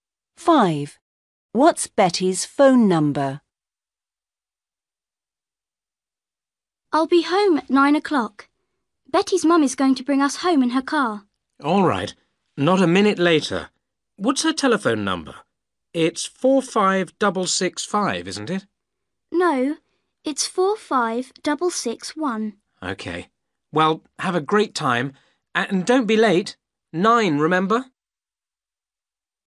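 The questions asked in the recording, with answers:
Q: What's Betty's phone number?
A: 45661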